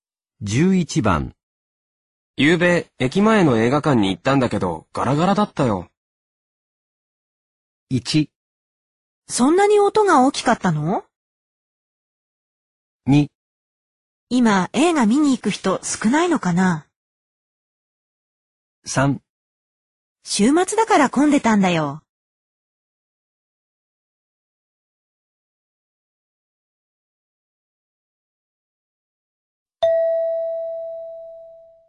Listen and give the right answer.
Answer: 2

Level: N2